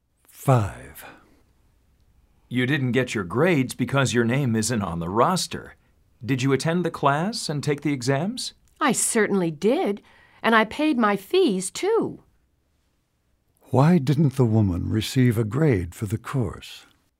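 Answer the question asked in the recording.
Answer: Her name isn't on the roster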